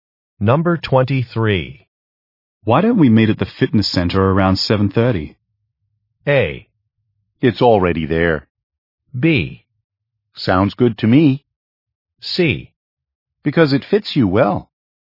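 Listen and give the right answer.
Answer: B: Sounds good to me.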